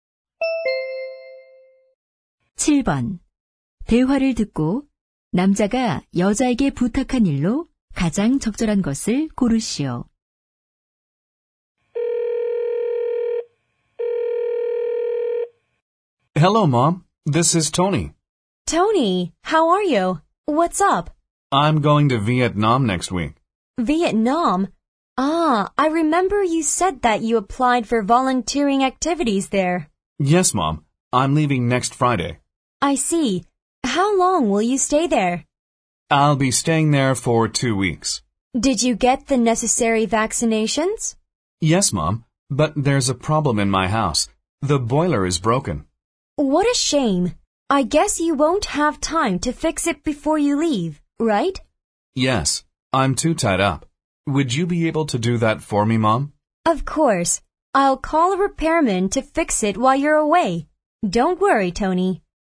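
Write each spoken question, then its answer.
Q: 대화를 듣고 남자가 여자에게 부탁한 일로 가장 적절한 것을 고르시오.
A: 고장 난 보일러 수리하기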